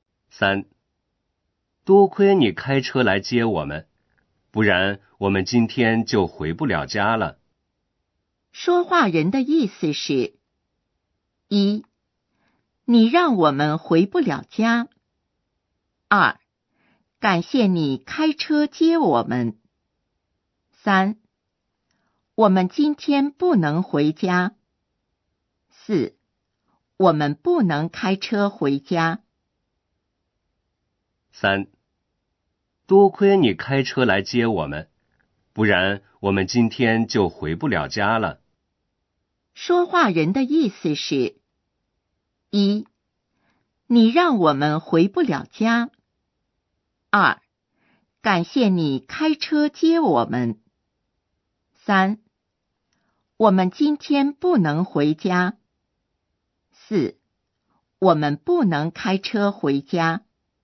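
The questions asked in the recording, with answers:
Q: 说话人的意思是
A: 二: 感谢你开车接我们。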